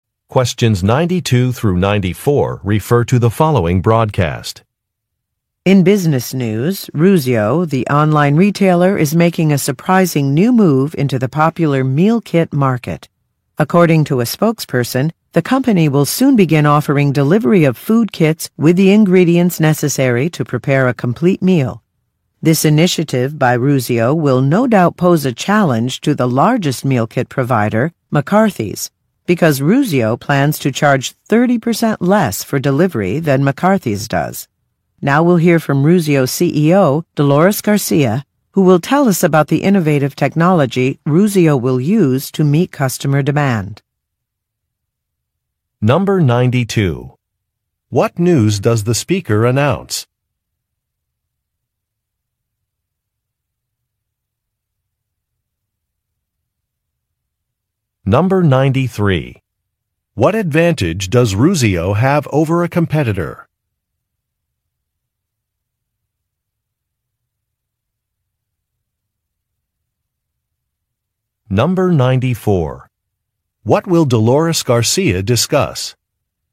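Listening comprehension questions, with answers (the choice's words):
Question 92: What news does the speaker announce?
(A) A business has won an award.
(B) A business will offer a new service.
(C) A business has replaced a CEO.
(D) A business will be moving its headquarters.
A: A business will offer a new service.

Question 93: What advantage does Ruzio have over a competitor?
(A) It will charge customers less.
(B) It will sell higher-quality products.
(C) It will offer a money-back guarantee.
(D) It is a better-known brand.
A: It will charge customers less.

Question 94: What will Dolores Garcia discuss?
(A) Her previous work experience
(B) Customer loyalty programs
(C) Ruzio's plan to hire more employees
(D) Ruzio's use of new technology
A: Ruzio's use of new technology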